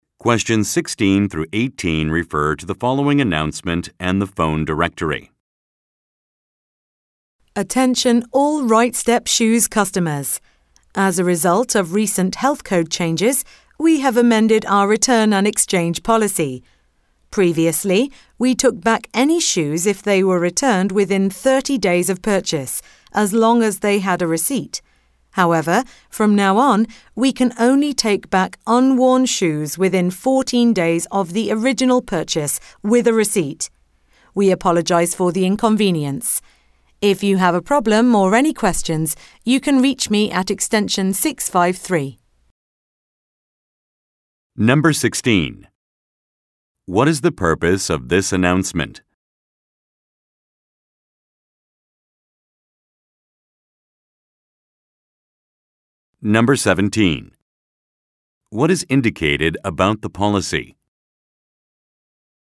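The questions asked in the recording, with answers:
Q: What is the purpose of this announcement?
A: To announce a change to the return and exchange policy

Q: What is indicated about the policy?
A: Only unworn shoes can be returned within 14 days of purchase with a receipt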